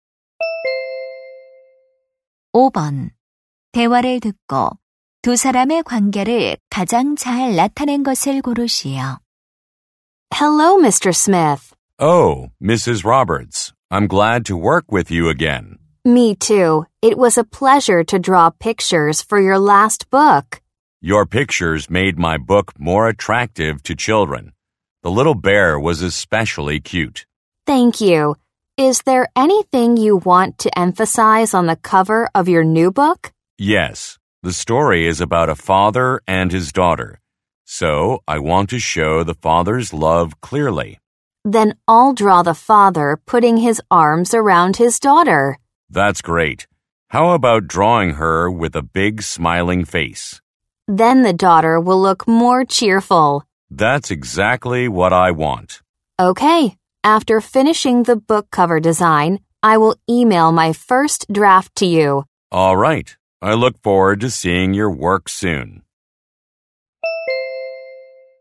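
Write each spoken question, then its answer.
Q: 대화를 듣고 두 사람의 관계를 가장 잘 나타낸 것을 고르시오.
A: 작가 - 삽화가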